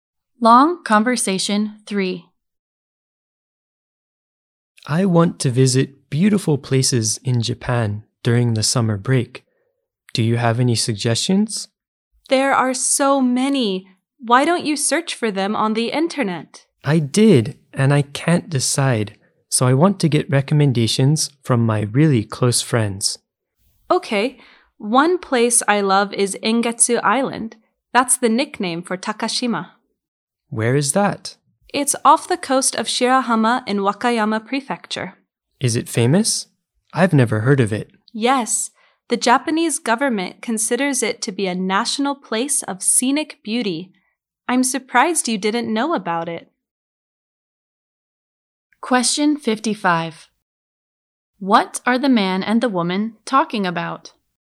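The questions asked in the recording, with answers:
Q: What are the man and the woman talking about?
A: Beautiful places to visit in Japan during the summer break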